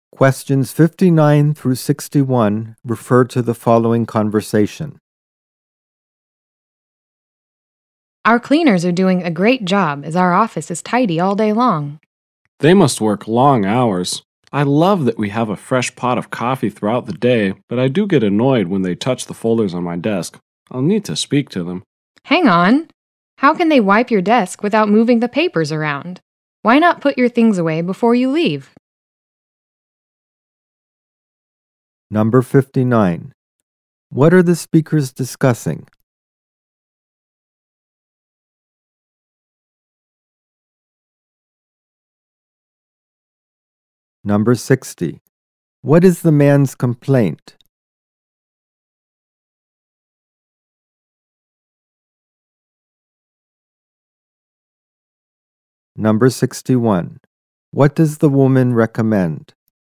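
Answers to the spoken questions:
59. The office cleaners
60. The cleaners touch the folders on his desk
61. Putting his things away before he leaves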